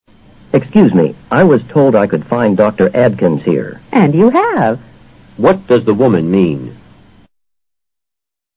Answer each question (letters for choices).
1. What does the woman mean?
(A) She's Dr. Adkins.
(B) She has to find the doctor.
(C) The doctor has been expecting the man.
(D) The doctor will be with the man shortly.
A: A

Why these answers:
And you have = Yes. And you have found her. 表明说话人就是Dr Adkins。And 用于句首起承上启下的作用,作"而且"解。